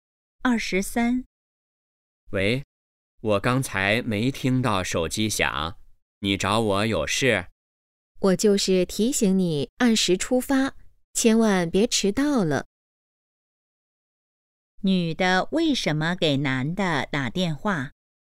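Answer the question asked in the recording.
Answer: 提醒他按时出发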